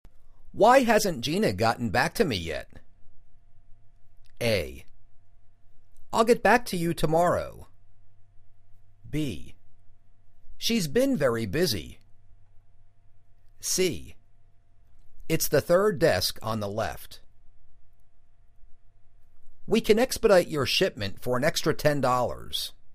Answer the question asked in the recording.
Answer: She's been very busy.